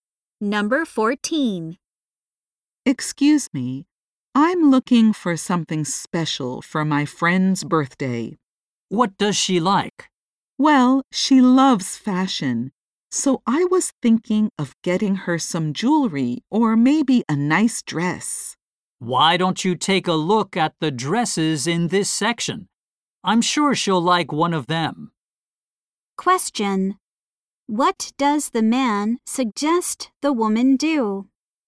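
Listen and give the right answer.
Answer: Look at the dresses in that section.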